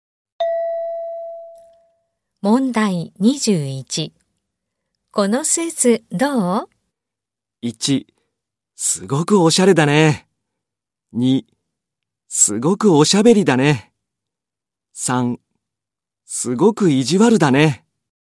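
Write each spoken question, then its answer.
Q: このスーツどう?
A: 1: すごくおしゃれだね。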